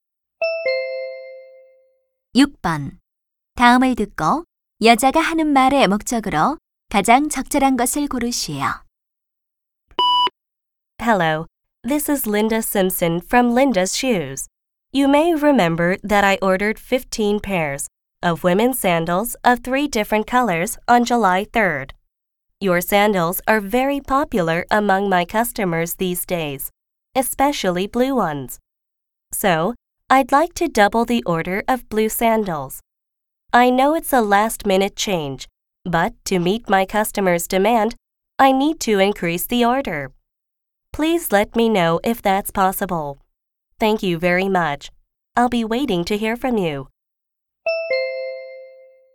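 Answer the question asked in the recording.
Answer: 파란색 샌들 주문량을 두 배로 늘리려고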